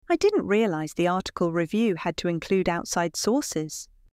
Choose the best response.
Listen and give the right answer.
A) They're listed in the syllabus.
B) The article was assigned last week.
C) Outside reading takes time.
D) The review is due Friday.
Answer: A) They're listed in the syllabus.